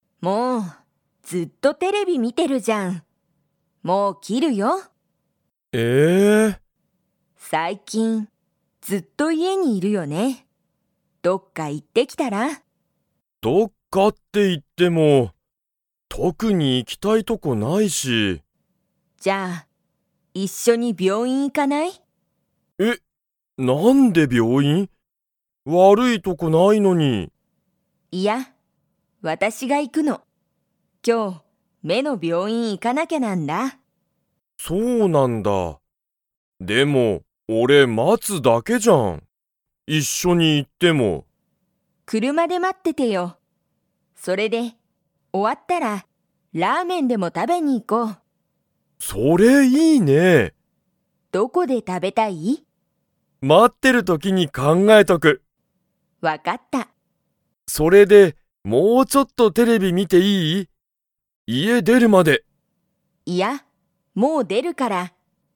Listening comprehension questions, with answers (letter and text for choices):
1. 夫おっとは最近さいきん、____。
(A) ずっと家いえにいる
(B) 車くるまが好すきだ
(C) テレビを見みない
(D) 病院びょういんによく行いく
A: (A) ずっと家いえにいる

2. 夫おっとは、妻つまと一緒いっしょに病院びょういんに行いきますか?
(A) はい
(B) いいえ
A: (A) はい

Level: Level 2